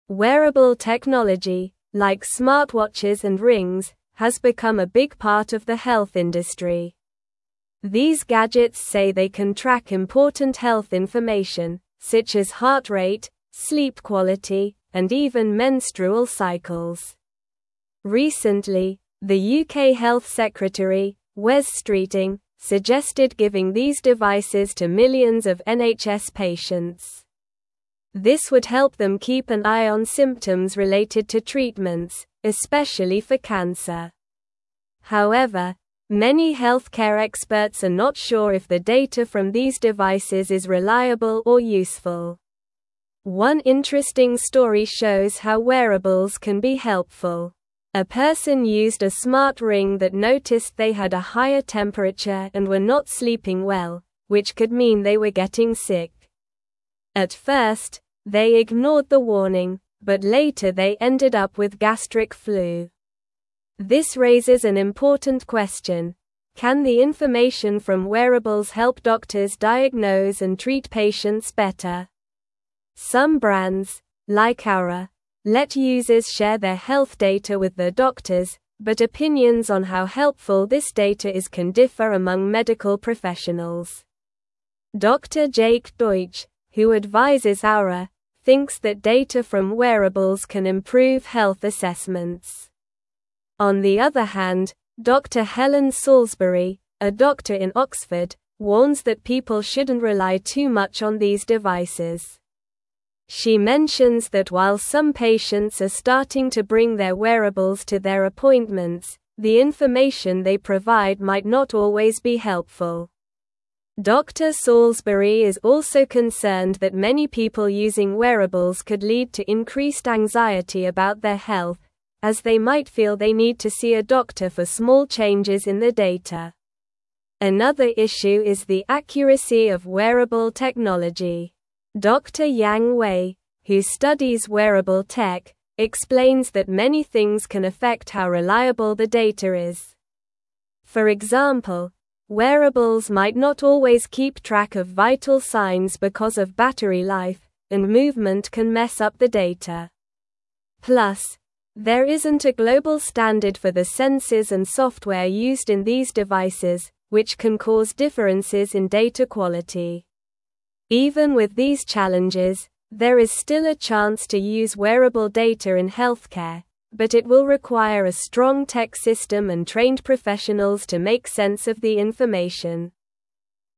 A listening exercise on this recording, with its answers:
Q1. These gadgets say they can track (1)______ health information, such as heart rate, sleep (2)______, and even menstrual cycles.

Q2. These gadgets say they can track (1)______ health information, such as heart rate, sleep (2)______, and even menstrual cycles.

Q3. This would help them keep an eye on symptoms (3)______ to treatments, especially for (4)______.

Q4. This would help them keep an eye on symptoms (3)______ to treatments, especially for (4)______.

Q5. A person used a smart ring that (5)______ they had a higher temperature and were not sleeping well, which could mean they were getting sick.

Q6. At first, they ignored the warning, but later they ended up with (6)______ flu.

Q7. Some brands, like Oura, let users (7)______ their health data with their doctors, but opinions on how helpful this data is can differ among medical (8)______.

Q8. Some brands, like Oura, let users (7)______ their health data with their doctors, but opinions on how helpful this data is can differ among medical (8)______.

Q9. Dr. Jake Deutsch, who advises Oura, thinks that data from (9)______ can improve health assessments.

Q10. On the other hand, Dr. Helen Salisbury, a (10)______ in Oxford, warns that people shouldn't rely too much on these (11)______.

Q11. On the other hand, Dr. Helen Salisbury, a (10)______ in Oxford, warns that people shouldn't rely too much on these (11)______.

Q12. Dr. Salisbury is also concerned that many people using wearables could lead to increased anxiety about their health, as they might feel they need to see a doctor for (12)______ changes in their data.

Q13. Dr. Yang Wei, who (13)______ wearable tech, explains that many things can affect how reliable the data is.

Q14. For example, wearables might not always keep track of (14)______ signs because of battery life, and movement can mess up the data.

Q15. Even with these (15)______, there is still a chance to use wearable data in (16)______, but it will require a strong tech system and trained professionals to make sense of the information.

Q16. Even with these (15)______, there is still a chance to use wearable data in (16)______, but it will require a strong tech system and trained professionals to make sense of the information.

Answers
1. important
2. quality
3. related
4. cancer
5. noticed
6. gastric
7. share
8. professionals
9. wearables
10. doctor
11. devices
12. small
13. studies
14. vital
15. challenges
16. healthcare

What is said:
Wearable technology, like smartwatches and rings, has become a big part of the health industry. These gadgets say they can track important health information, such as heart rate, sleep quality, and even menstrual cycles. Recently, the UK Health Secretary, Wes Streeting, suggested giving these devices to millions of NHS patients. This would help them keep an eye on symptoms related to treatments, especially for cancer. However, many healthcare experts are not sure if the data from these devices is reliable or useful.
One interesting story shows how wearables can be helpful. A person used a smart ring that noticed they had a higher temperature and were not sleeping well, which could mean they were getting sick. At first, they ignored the warning, but later they ended up with gastric flu. This raises an important question: can the information from wearables help doctors diagnose and treat patients better? Some brands, like Oura, let users share their health data with their doctors, but opinions on how helpful this data is can differ among medical professionals.
Dr. Jake Deutsch, who advises Oura, thinks that data from wearables can improve health assessments. On the other hand, Dr. Helen Salisbury, a doctor in Oxford, warns that people shouldn't rely too much on these devices. She mentions that while some patients are starting to bring their wearables to their appointments, the information they provide might not always be helpful. Dr. Salisbury is also concerned that many people using wearables could lead to increased anxiety about their health, as they might feel they need to see a doctor for small changes in their data.
Another issue is the accuracy of wearable technology. Dr. Yang Wei, who studies wearable tech, explains that many things can affect how reliable the data is. For example, wearables might not always keep track of vital signs because of battery life, and movement can mess up the data. Plus, there isn't a global standard for the sensors and software used in these devices, which can cause differences in data quality. Even with these challenges, there is still a chance to use wearable data in healthcare, but it will require a strong tech system and trained professionals to make sense of the information.

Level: Level 3